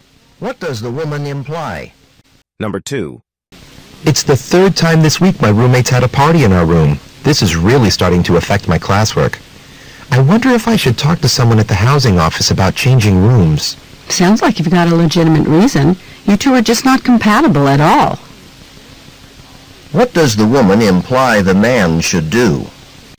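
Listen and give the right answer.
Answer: Ask the housing office about changing rooms.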